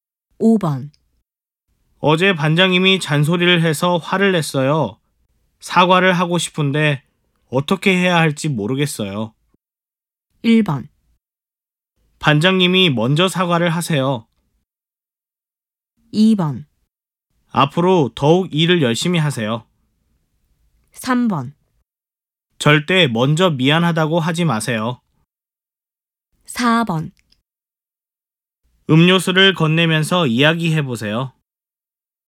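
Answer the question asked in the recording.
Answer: 4: 음료수를 건네면서 이야기해보세요.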